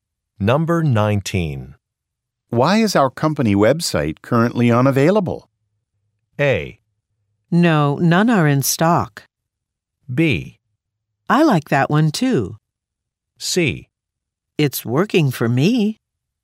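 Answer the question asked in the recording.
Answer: C: It's working for me.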